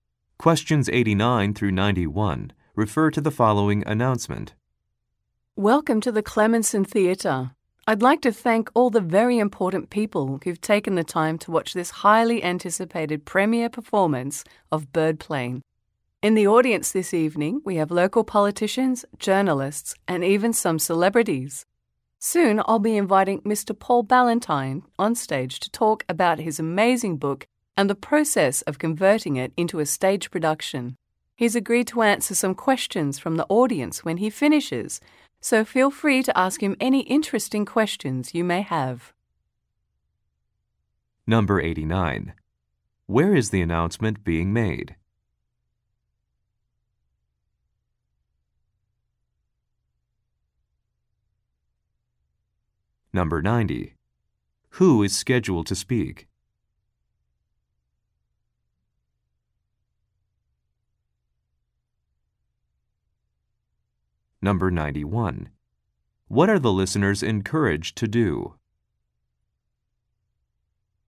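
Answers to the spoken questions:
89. At a theater
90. Paul Ballantyne, the book's author
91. Ask the speaker questions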